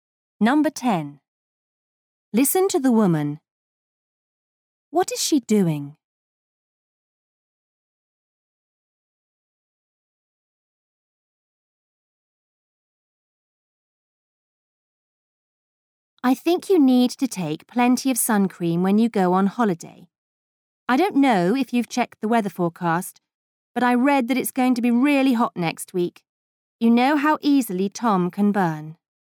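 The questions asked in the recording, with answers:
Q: What is she doing?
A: Giving advice (to take sun cream)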